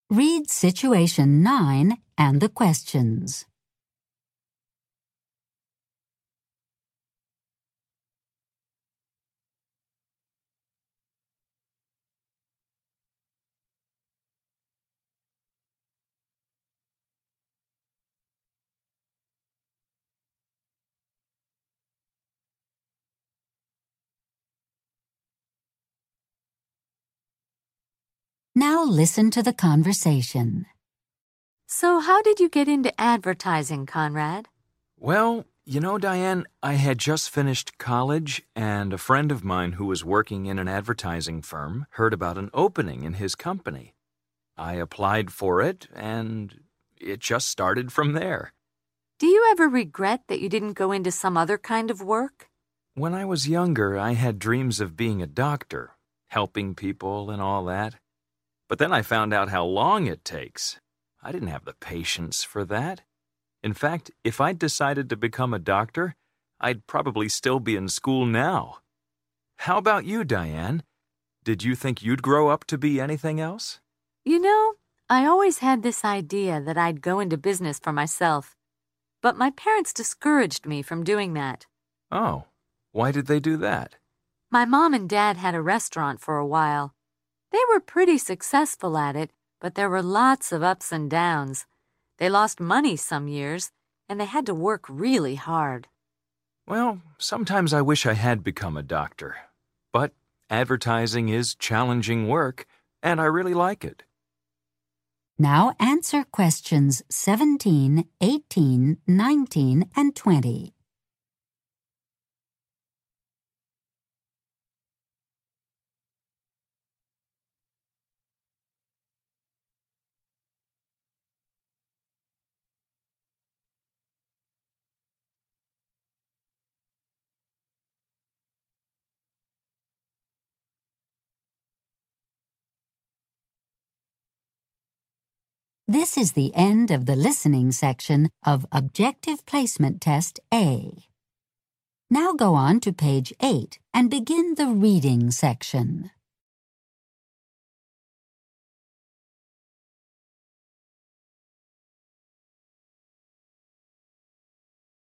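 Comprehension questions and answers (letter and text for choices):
Listen to the conversations and choose the correct answers.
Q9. When Conrad was young, he wanted to ___________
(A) work in advertising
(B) become a doctor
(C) stay in school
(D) go into business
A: (B) become a doctor

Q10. Diane's parents didn't want her to ___________.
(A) start her own business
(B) finish college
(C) be successful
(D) change her career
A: (A) start her own business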